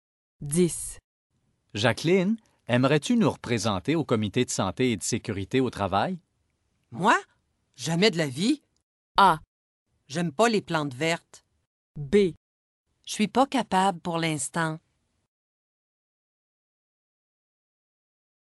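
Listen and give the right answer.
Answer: B: Je suis pas capable pour l'instant.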